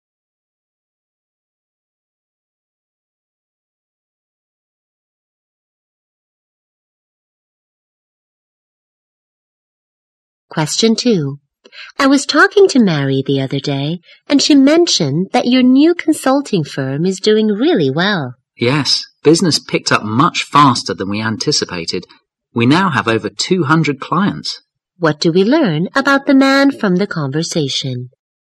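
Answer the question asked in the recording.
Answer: His new consulting firm is doing well and now has over 200 clients.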